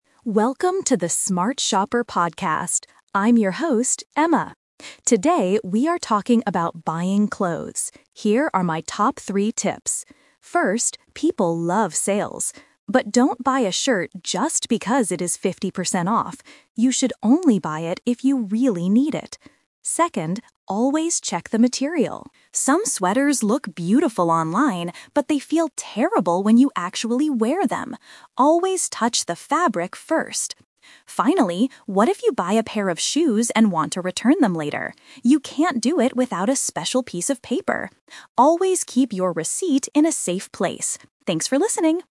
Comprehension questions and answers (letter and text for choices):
Listen to a consumer expert on a podcast and choose the correct answer (A, B, or C).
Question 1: What does Emma say about buying clothes on sale?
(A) You should buy them if they are 50% off.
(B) You should only buy them if you need them.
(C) You should never buy clothes on sale.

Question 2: Why should you check the material of a sweater?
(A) Because it might feel terrible to wear.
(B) Because some materials are too expensive.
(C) Because online stores sell the best materials.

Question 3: What must you keep if you want to return a pair of shoes?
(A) The shoe box.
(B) The price tag.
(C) The receipt.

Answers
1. (B) You should only buy them if you need them.
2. (A) Because it might feel terrible to wear.
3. (C) The receipt.

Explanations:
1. Emma says, "don't buy a shirt just because it is fifty percent off. You should only buy it if you really need it." Option (A) is the trap because she specifically tells you not to do this. Option (C) is too extreme and not what she said.
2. Emma warns that "Some sweaters look beautiful online, but they feel terrible when you actually wear them." Option (C) is a trap; she mentions clothes looking beautiful online, but not that they have the best materials. Option (B) is not mentioned.
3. Emma asks what happens if you want to return shoes, and advises: "Always keep your receipt in a safe place!" Options (A) and (B) are plausible things you might need to keep when returning clothes, but they are not mentioned in the audio.

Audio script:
Emma: Welcome to the Smart Shopper podcast. I'm your host, Emma. Today, we are talking about buying clothes. Here are my top three tips. First, people love sales. But don't buy a shirt just because it is fifty percent off. You should only buy it if you really need it. Second, always check the material. Some sweaters look beautiful online, but they feel terrible when you actually wear them. Always touch the fabric first! Finally, what if you buy a pair of shoes and want to return them later? You can't do it without a special piece of paper. Always keep your receipt in a safe place! Thanks for listening.

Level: A2